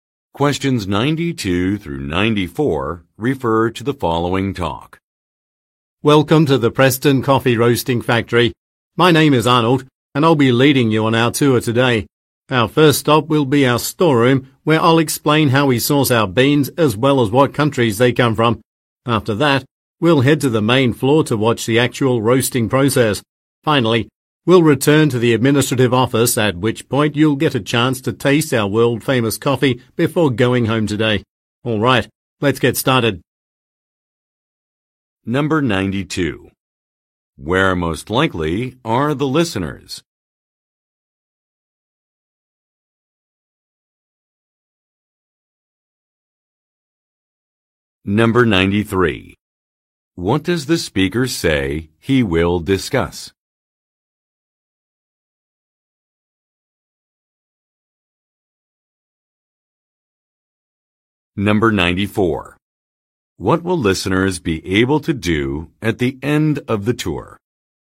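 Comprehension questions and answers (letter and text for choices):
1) Where most likely are the listeners?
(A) At a farm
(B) At a food processing plant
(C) At a café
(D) At a research facility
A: (B) At a food processing plant

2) What does the speaker say he will discuss?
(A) The origins of some ingredients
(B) The uses of some machinery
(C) The purpose of a project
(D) The size of an organization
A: (A) The origins of some ingredients

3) What will listeners be able to do at the end of the tour?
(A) View an instructional video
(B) Meet a business owner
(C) Make a purchase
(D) Try a sample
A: (D) Try a sample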